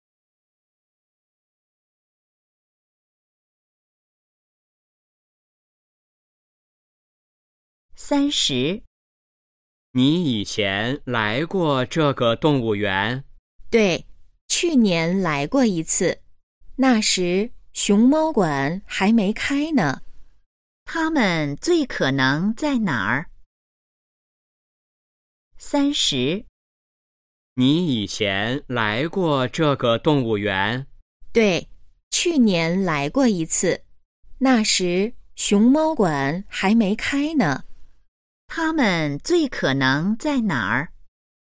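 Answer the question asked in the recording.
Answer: 动物园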